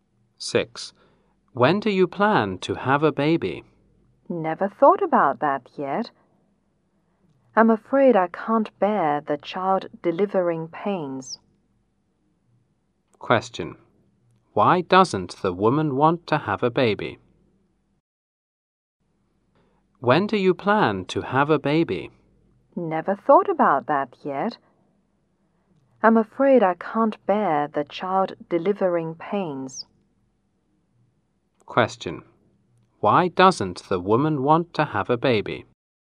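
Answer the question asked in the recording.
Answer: She is afraid she can't bear the pain of giving birth.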